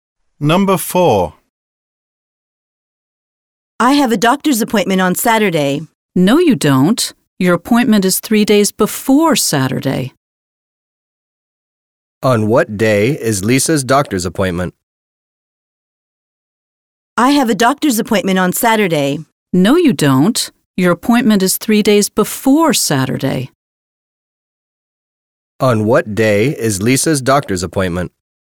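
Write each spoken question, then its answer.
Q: On what day is Lisa's doctor's appointment?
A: Wednesday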